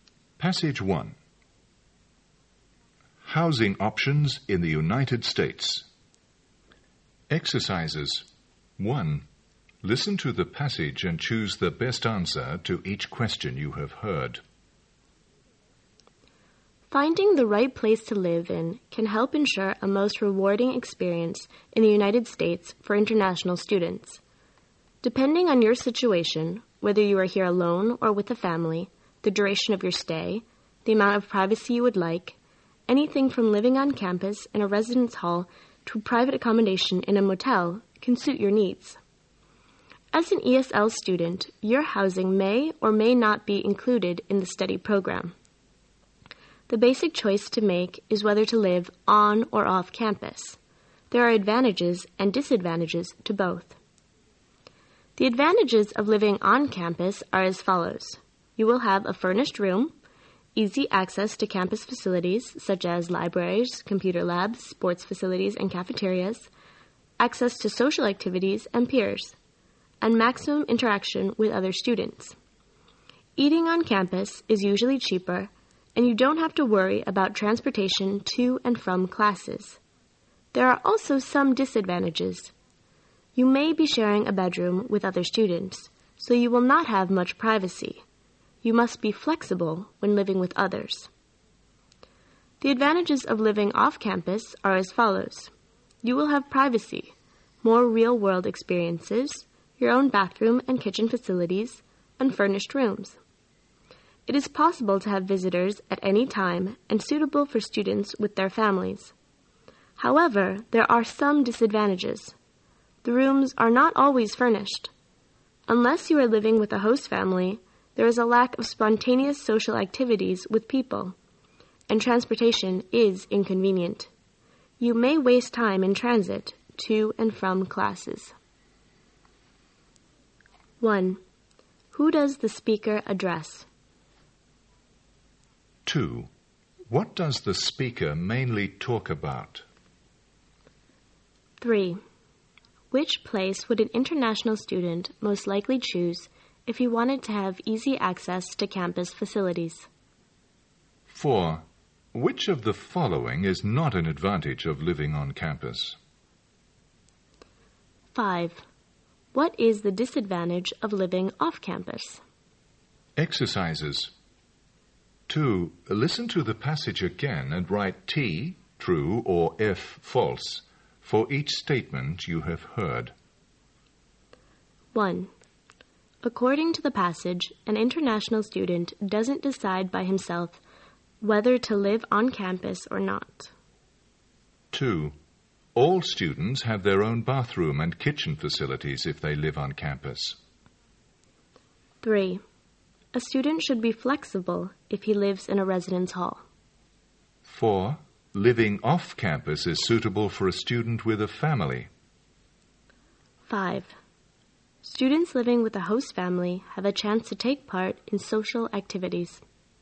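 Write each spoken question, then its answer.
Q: 1. Who does the speaker address?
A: International students

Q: 2. What does the speaker mainly talk about?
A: Housing options for international students in the US

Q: 3. Which place would an international student most likely choose if he wanted to have easy access to campus facilities?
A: On campus, in a residence hall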